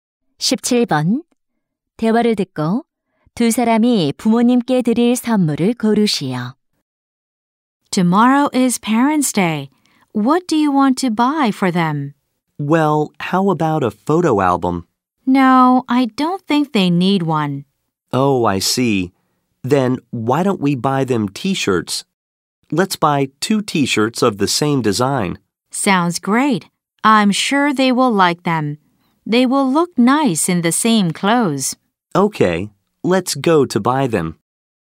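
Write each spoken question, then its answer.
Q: 대화를 듣고 두 사람이 부모님께 드릴 선물을 고르시오.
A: 같은 디자인의 티셔츠 두 벌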